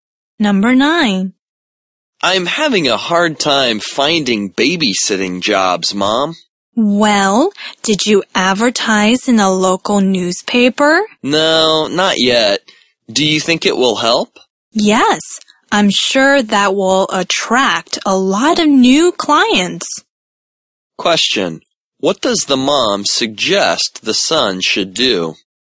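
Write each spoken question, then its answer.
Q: What does the mom suggest the son should do?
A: Advertise in a local newspaper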